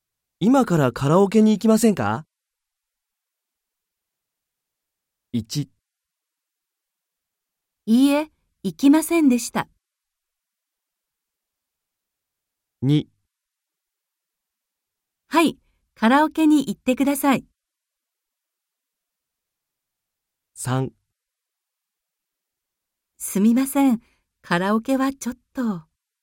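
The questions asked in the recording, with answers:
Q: 今からカラオケに行きませんか?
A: 3: すみません、カラオケはちょっと。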